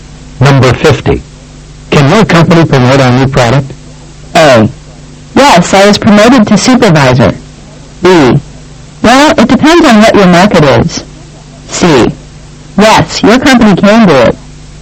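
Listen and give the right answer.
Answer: B: Well, it depends on what your market is.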